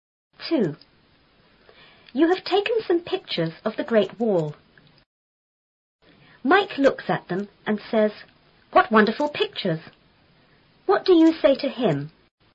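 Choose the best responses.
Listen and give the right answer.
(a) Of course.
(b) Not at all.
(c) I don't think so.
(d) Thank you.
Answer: (d) Thank you.

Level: 初中英语广州版4B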